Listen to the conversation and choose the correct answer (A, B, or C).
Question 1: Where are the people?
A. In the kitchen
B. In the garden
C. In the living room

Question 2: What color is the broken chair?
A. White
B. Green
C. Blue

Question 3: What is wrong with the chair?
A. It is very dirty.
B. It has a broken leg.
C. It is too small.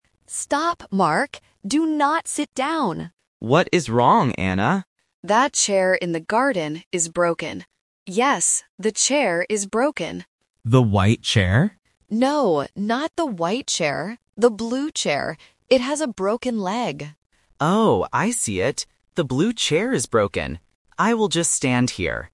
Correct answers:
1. In the garden
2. Blue
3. It has a broken leg.

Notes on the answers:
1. Anna clearly says, "That chair in the garden is broken." Options (A) and (C) are plausible areas in a house but are not mentioned in the audio.
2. Anna says, "The blue chair". Option (A) "White" is the trap because Mark asks about the white chair, but Anna explicitly rejects it ("No, not the white chair"). Option (B) "Green" is a plausible color for a garden setting but is never mentioned.
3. Anna warns Mark by saying, "It has a broken leg." Options (A) and (C) are plausible reasons not to sit on a chair, but they are not the reasons given in this conversation.

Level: A1

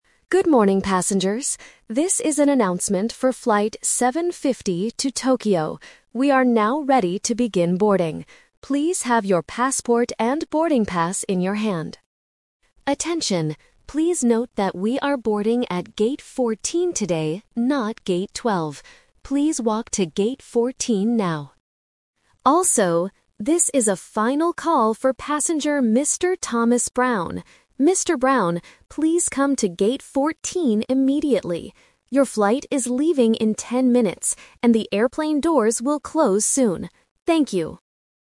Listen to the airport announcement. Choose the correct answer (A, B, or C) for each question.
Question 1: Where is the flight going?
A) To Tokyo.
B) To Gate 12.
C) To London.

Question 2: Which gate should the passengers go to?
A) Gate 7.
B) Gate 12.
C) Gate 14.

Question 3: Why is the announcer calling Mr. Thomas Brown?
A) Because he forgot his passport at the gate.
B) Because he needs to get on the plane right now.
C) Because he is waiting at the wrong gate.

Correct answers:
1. To Tokyo.
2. Gate 14.
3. Because he needs to get on the plane right now.

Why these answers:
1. The announcer says, "This is an announcement for flight 750 to Tokyo." Option (B) is a trap; Gate 12 is a place in the airport, not the destination city. Option (C) is not mentioned.
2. This is The Twist. The announcer tells the passengers "we are boarding at Gate 14 today, not Gate 12." Option (B) is the trap (the old gate). Option (A) is a trap using the number 7 from the flight number (750).
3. The announcer makes a "final call" for Mr. Brown and says "Your flight is leaving in ten minutes." This means he must board immediately. Option (A) is a trap; the word "passport" was mentioned earlier for all passengers, not just Mr. Brown. Option (C) is a plausible real-life reason, but it is not mentioned in the audio.

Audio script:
Announcer: Good morning, passengers. This is an announcement for flight 750 to Tokyo. We are now ready to begin boarding. Please have your passport and boarding pass in your hand.
Attention, please note that we are boarding at Gate 14 today, not Gate 12. Please walk to Gate 14 now.
Also, this is a final call for passenger Mr. Thomas Brown. Mr. Brown, please come to Gate 14 immediately. Your flight is leaving in ten minutes, and the airplane doors will close soon. Thank you.

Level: A2

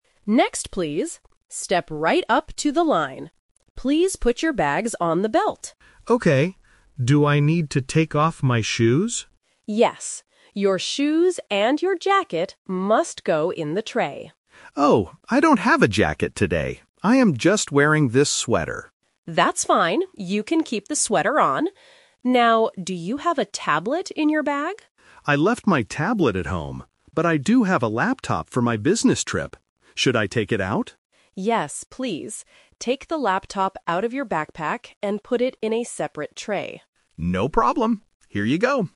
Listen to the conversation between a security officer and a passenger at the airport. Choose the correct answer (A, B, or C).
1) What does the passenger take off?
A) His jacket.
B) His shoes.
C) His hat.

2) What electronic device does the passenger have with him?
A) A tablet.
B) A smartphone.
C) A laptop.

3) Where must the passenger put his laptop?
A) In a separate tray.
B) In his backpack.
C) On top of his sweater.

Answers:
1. His shoes.
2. A laptop.
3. In a separate tray.

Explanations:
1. The officer tells him to put "shoes and your jacket" in the tray. However, the passenger says, "I don't have a jacket today" (Option A is The Trap). Therefore, he only takes off his shoes. Option (C) is not mentioned.
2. The officer asks about a tablet (Option A - The Trap), but the passenger says, "I left my tablet at home, but I do have a laptop." Option (B) is a common item but is never mentioned in the audio.
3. The officer clearly instructs, "Take the laptop out of your backpack and put it in a separate tray." Option (B) is The Trap because the laptop was originally inside the backpack, but he has to take it out.

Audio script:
Security Officer: Next, please! Step right up to the line. Please put your bags on the belt.
Passenger: Okay. Do I need to take off my shoes?
Security Officer: Yes. Your shoes and your jacket must go in the tray.
Passenger: Oh, I don't have a jacket today. I am just wearing this sweater.
Security Officer: That's fine, you can keep the sweater on. Now, do you have a tablet in your bag?
Passenger: I left my tablet at home, but I do have a laptop for my business trip. Should I take it out?
Security Officer: Yes, please. Take the laptop out of your backpack and put it in a separate tray.

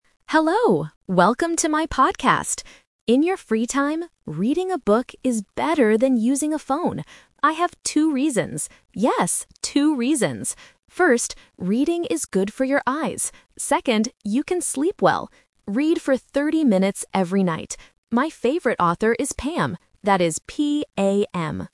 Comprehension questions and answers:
Listen to a short podcast about reading and choose the correct answer (A, B, or C) for each question.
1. How many reasons does the podcaster give?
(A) Three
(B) Thirty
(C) Two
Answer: Two

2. How long should you read every night?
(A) Thirteen minutes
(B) Thirty minutes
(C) Two minutes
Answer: Thirty minutes

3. What is the name of the favorite author?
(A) Pam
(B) Bam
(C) Pan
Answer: Pam

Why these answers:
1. The podcaster clearly states and repeats, "I have two reasons. Yes, two reasons!" Option (A) "Three" is not mentioned. Option (B) "Thirty" is a trap because the speaker mentions "thirty minutes" later in the audio, but it is not the number of reasons.
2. The speaker says, "Read for thirty minutes every night." Option (A) "Thirteen minutes" is a trap because "thirteen" sounds very similar to "thirty" (a classic A1 phonetic trap). Option (C) "Two minutes" is a trap that reuses the number of reasons from the previous sentence.
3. The podcaster spells the name clearly: "That is P-A-M." Option (B) "Bam" and Option (C) "Pan" are distractors because they sound very similar to "Pam", testing the listener's ability to hear specific letters.

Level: A1

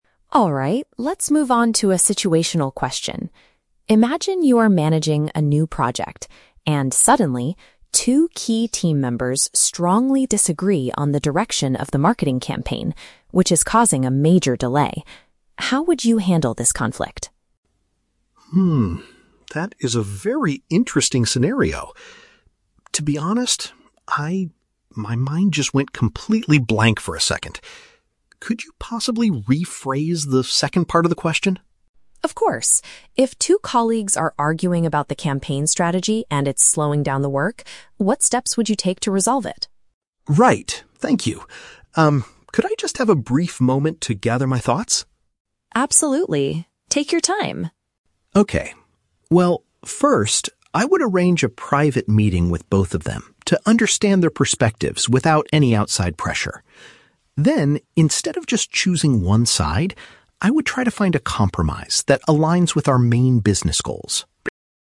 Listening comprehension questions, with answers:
Listen to a conversation between an interviewer and a job candidate. Choose the correct answer (A, B, or C) for each question.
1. What is the main problem in the scenario the interviewer describes?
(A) The marketing campaign is becoming too expensive.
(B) A project is delayed because coworkers are arguing.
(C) Two team members decided to quit their jobs unexpectedly.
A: A project is delayed because coworkers are arguing.

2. How does the candidate react when first asked the question?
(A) He answers immediately with a detailed business plan.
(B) He refuses to answer because the scenario is too difficult.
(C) He politely asks for the question to be explained in a different way.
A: He politely asks for the question to be explained in a different way.

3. What is the candidate's proposed solution to the problem?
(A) To have a confidential discussion with the two colleagues.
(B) To ask the company director to decide the marketing strategy.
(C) To remove the arguing employees from the project team.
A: To have a confidential discussion with the two colleagues.

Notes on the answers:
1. The interviewer says "two key team members strongly disagree... which is causing a major delay." "Coworkers are arguing" is a paraphrase of team members strongly disagreeing.
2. The candidate admits his mind went blank and asks, "Could you possibly rephrase the second part of the question?" "Rephrase" means to explain in a different way.
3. The candidate says he would "arrange a private meeting with both of them." A "private meeting" is paraphrased as a "confidential discussion."

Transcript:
Interviewer: Alright, let's move on to a situational question. Imagine you are managing a new project and suddenly, two key team members strongly disagree on the direction of the marketing campaign, which is causing a major delay. How would you handle this conflict?
that is a very interesting scenario. To be honest, I... my mind just went completely blank for a second. Could you possibly rephrase the second part of the question?
Interviewer: Of course. If two colleagues are arguing about the campaign strategy and it's slowing down the work, what steps would you take to resolve it?
Candidate: Right, thank you. Um, could I just have a brief moment to gather my thoughts?
Interviewer: Absolutely. Take your time.
Candidate: Okay. Well, first, I would arrange a private meeting with both of them to understand their perspectives without any outside pressure. Then, instead of just choosing one side, I would try to find a compromise that aligns with our main business goals.

